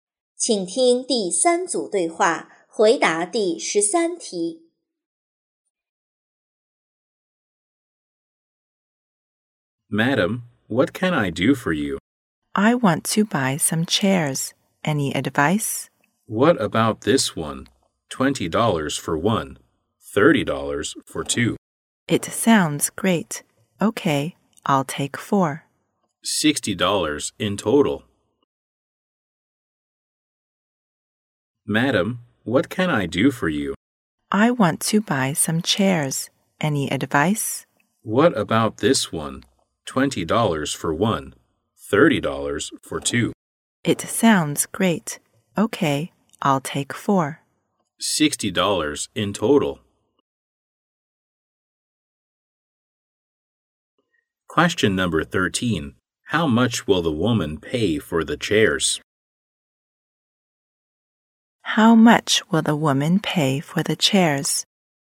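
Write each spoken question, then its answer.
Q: How much will the woman pay for the chairs?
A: $60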